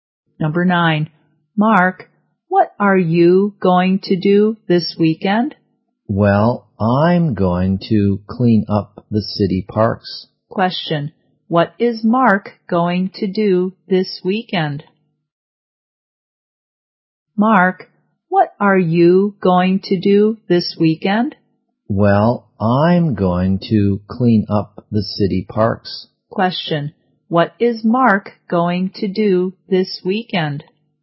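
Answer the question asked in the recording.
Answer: Clean up the city parks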